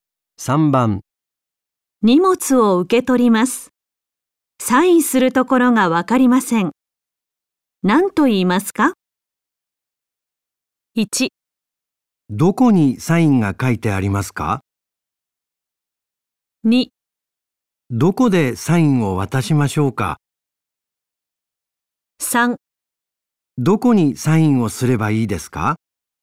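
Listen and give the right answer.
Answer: 3: どこにサインをすればいいですか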